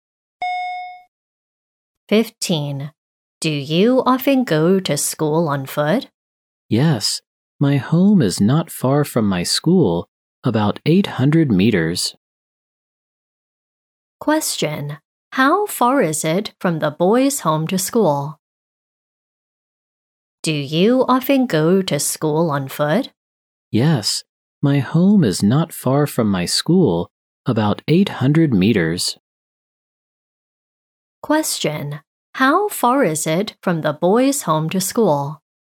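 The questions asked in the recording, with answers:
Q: Question. How far is it from the boys' home to school?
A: About 800 meters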